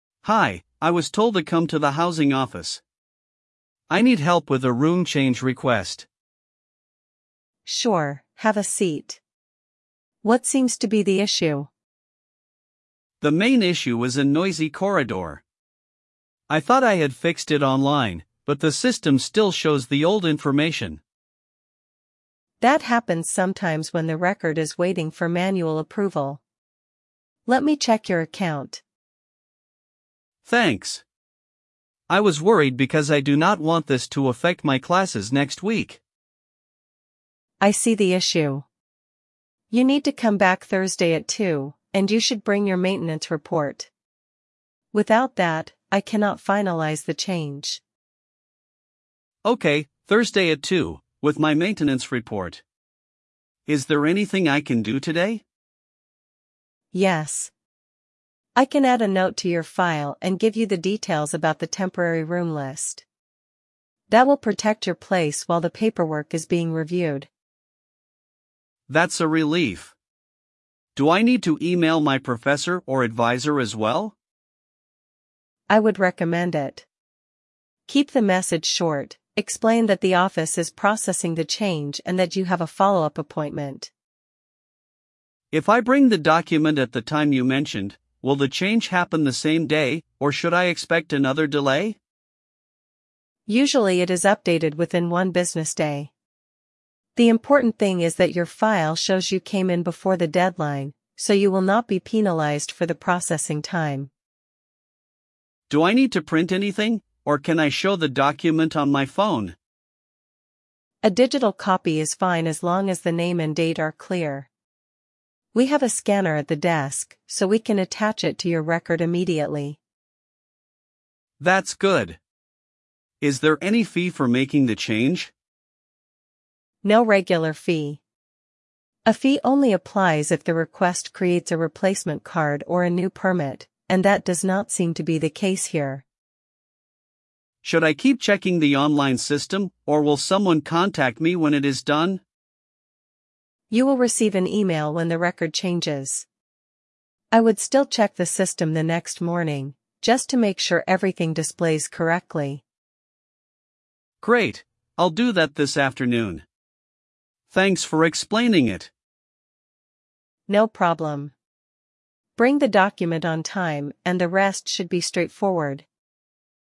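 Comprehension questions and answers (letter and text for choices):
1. Why does the student visit the office?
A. To get help with a room change request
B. To pay a parking fine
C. To borrow a textbook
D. To attend a lecture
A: A. To get help with a room change request

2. What is the main issue?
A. A noisy corridor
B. A lost phone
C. A cancelled concert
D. A broken printer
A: A. A noisy corridor

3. Why has the online change not gone through?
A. It needs manual approval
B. The student missed the deadline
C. The professor rejected it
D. The office is closed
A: A. It needs manual approval

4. When should the student come back?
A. Tomorrow morning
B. Thursday at two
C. Next month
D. After graduation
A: B. Thursday at two

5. What should the student bring?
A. Maintenance report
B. A library book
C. A bus ticket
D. A lab coat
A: A. Maintenance report

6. What will the staff do today?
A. Add a note and explain the temporary room list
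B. Cancel the student's account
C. Call the student's parents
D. Move the exam date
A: A. Add a note and explain the temporary room list

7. What does the staff recommend emailing?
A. A short explanation to the professor or advisor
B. A complaint to the dean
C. A refund request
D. A job application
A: A. A short explanation to the professor or advisor

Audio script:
Student: Hi, I was told to come to the housing office. I need help with a room change request.
Staff: Sure, have a seat. What seems to be the issue?
Student: The main issue is a noisy corridor. I thought I had fixed it online, but the system still shows the old information.
Staff: That happens sometimes when the record is waiting for manual approval. Let me check your account.
Student: Thanks. I was worried because I do not want this to affect my classes next week.
Staff: I see the issue. You need to come back Thursday at two, and you should bring your maintenance report. 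Without that, I cannot finalise the change.
Student: Okay, Thursday at two, with my maintenance report. Is there anything I can do today?
Staff: Yes. I can add a note to your file and give you the details about the temporary room list. That will protect your place while the paperwork is being reviewed.
Student: That's a relief. Do I need to email my professor or advisor as well?
Staff: I would recommend it. Keep the message short: explain that the office is processing the change and that you have a follow-up appointment.
Student: If I bring the document at the time you mentioned, will the change happen the same day, or should I expect another delay?
Staff: Usually it is updated within one business day. The important thing is that your file shows you came in before the deadline, so you will not be penalised for the processing time.
Student: Do I need to print anything, or can I show the document on my phone?
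Staff: A digital copy is fine as long as the name and date are clear. We have a scanner at the desk, so we can attach it to your record immediately.
Student: That's good. Is there any fee for making the change?
Staff: No regular fee. A fee only applies if the request creates a replacement card or a new permit, and that does not seem to be the case here.
Student: Should I keep checking the online system, or will someone contact me when it is done?
Staff: You will receive an email when the record changes. I would still check the system the next morning, just to make sure everything displays correctly.
Student: Great, I'll do that this afternoon. Thanks for explaining it.
Staff: No problem. Bring the document on time, and the rest should be straightforward.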